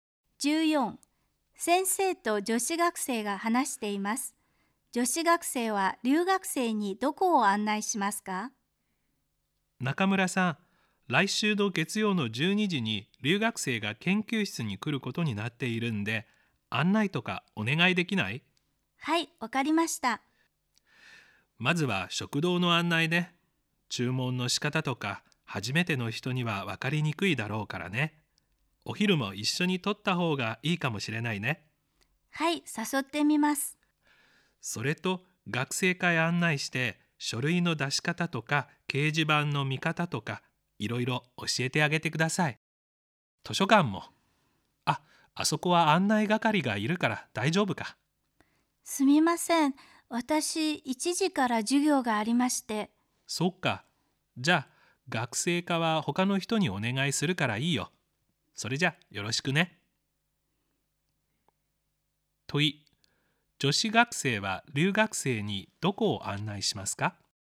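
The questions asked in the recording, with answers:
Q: 問い。女子学生は留学生にどこを案内しますか?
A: 食堂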